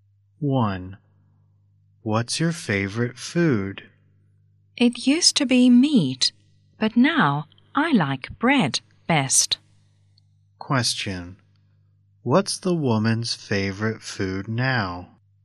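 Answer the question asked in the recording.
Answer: Bread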